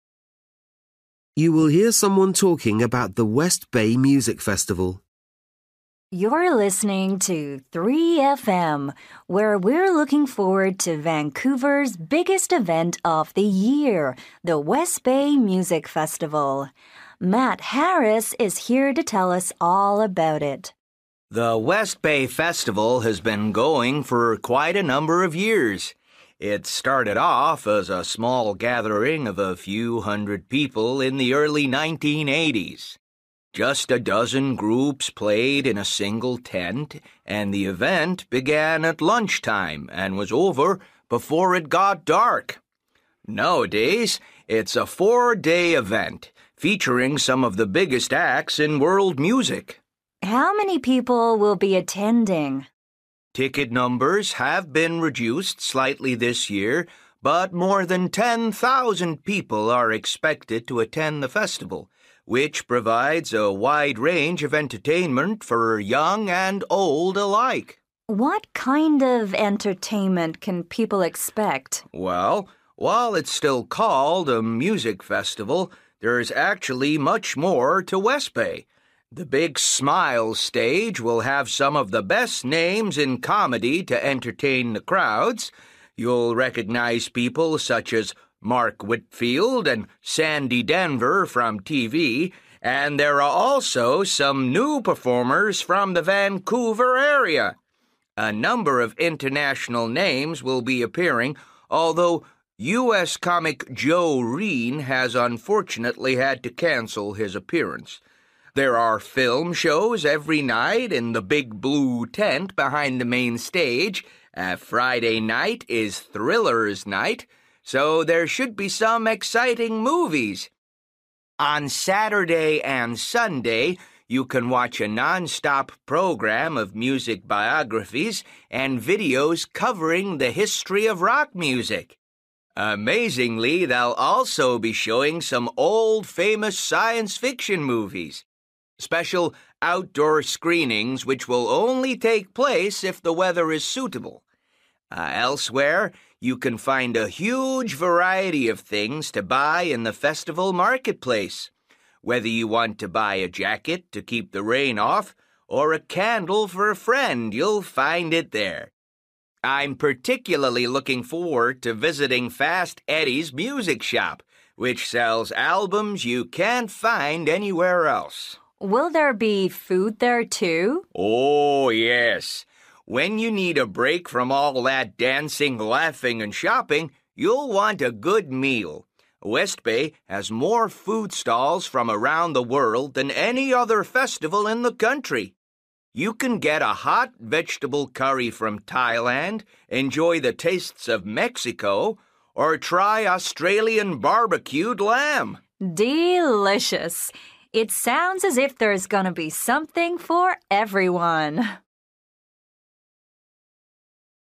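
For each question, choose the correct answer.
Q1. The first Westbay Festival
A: was a small one-day event with a dozen groups in a single tent, ending before dark

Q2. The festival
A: has fewer tickets this year but over 10,000 people are expected

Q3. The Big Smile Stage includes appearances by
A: comedians, including new performers from the Vancouver area

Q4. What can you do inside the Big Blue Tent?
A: watch films

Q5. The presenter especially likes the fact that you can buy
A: albums you can't find anywhere else

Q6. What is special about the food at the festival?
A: it has more food stalls from around the world than any other festival in the country

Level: Luyện nghe trình độ B1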